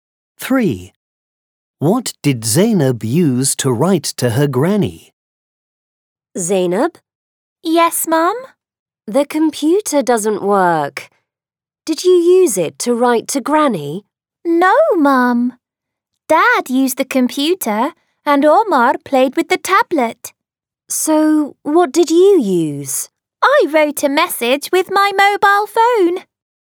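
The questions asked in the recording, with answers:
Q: What did Zainab use to write to her granny?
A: her mobile phone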